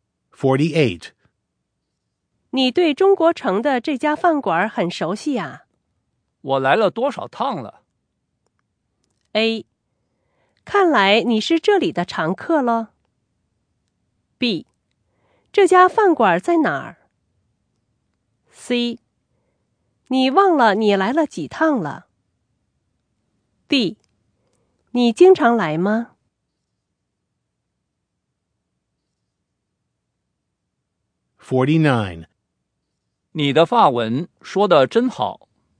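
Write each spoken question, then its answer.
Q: 我来了多少趟了?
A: A: 看来你是这里的常客了。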